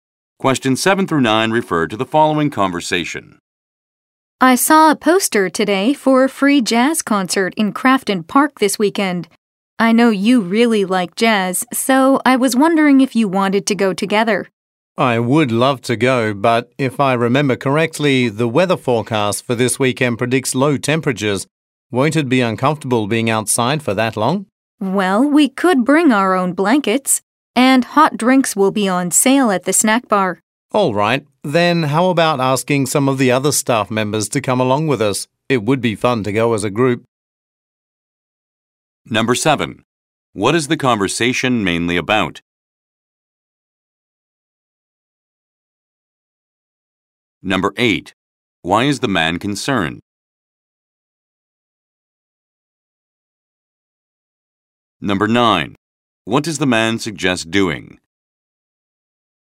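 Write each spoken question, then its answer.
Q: What is the conversation mainly about?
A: Going to a free jazz concert in Crafton Park this weekend

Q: Why is the man concerned?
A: The weather forecast predicts low temperatures, so it may be uncomfortable outside

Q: What does the man suggest doing?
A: Inviting other staff members to go along as a group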